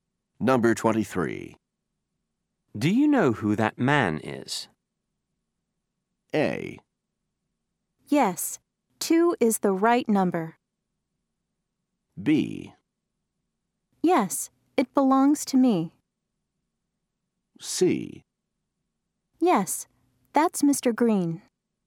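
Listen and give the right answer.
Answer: C: Yes, that's Mr. Green.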